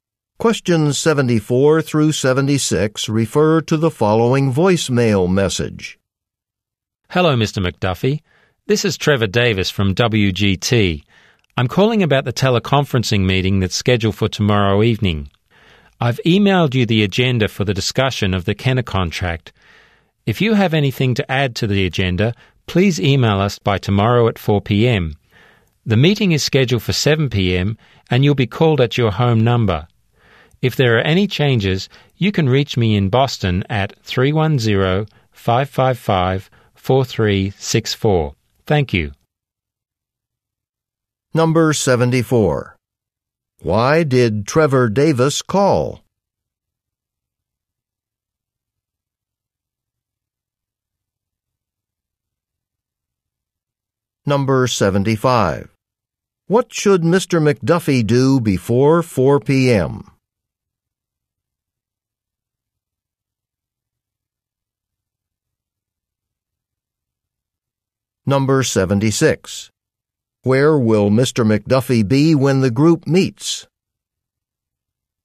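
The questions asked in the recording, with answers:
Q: Why did Trevor Davis call?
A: About tomorrow's teleconference meeting

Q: What should Mr.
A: Email any additions to the agenda

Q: Where will Mr.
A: At home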